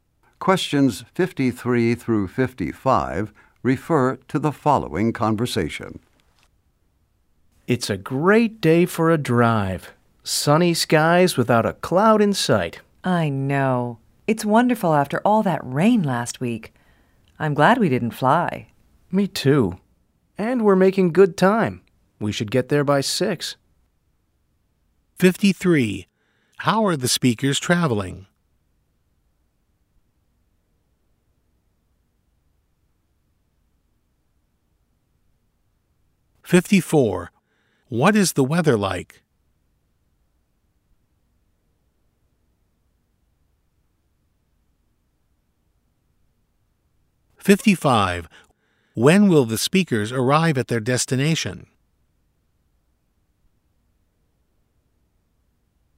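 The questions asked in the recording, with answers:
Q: How are the speakers traveling?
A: By car

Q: What is the weather like?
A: Sunny and clear

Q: When will the speakers arrive at their destination?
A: By 6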